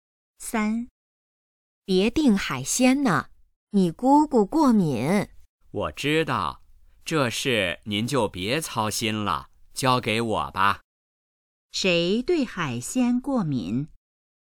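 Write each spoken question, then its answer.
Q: 谁对海鲜过敏?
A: 姑姑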